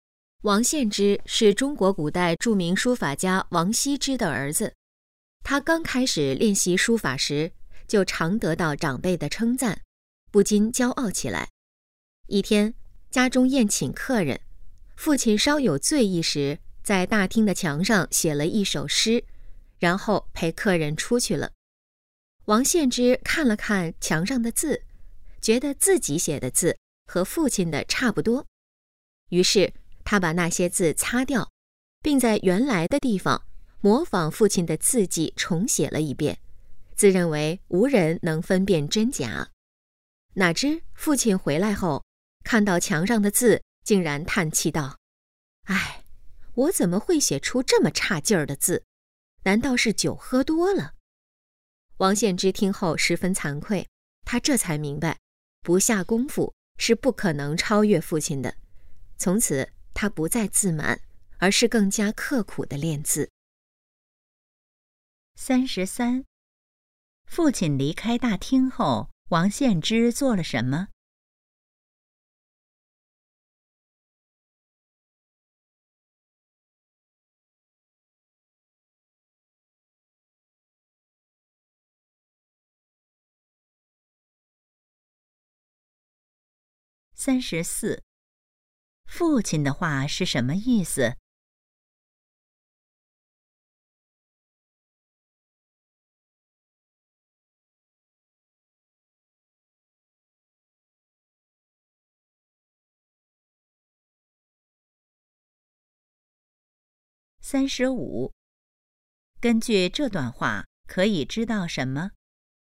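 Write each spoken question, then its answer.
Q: 父亲离开大厅后,王献之做了什么?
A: 擦掉父亲的字,模仿父亲的字迹重写

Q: 父亲的话是什么意思?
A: 墙上的字写得很差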